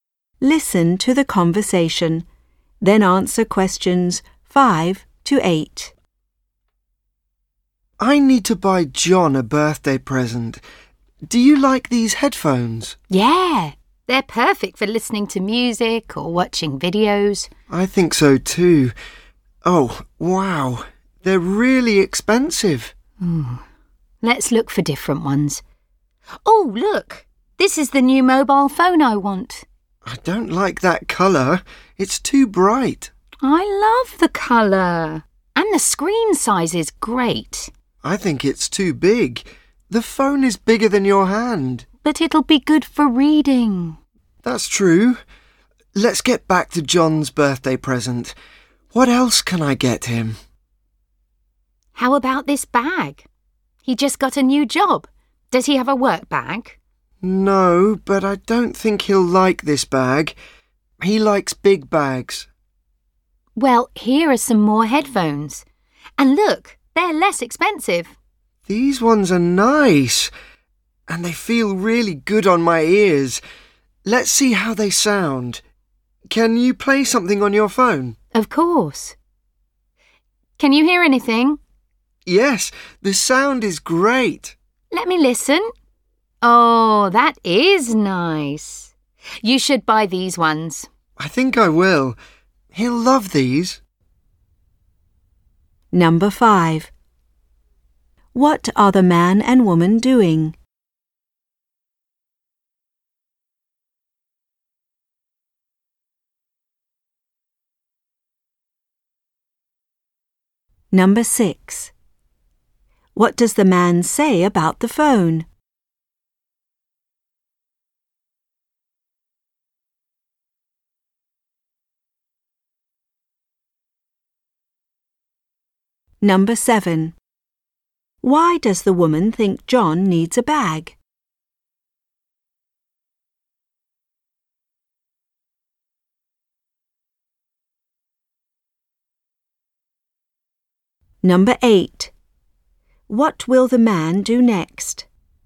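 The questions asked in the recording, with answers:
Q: What are the man and woman doing?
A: Shopping for a birthday present for John

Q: What does the man say about the phone?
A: It's too big

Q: Why does the woman think John needs a bag?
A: He just got a new job

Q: What will the man do next?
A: Buy the headphones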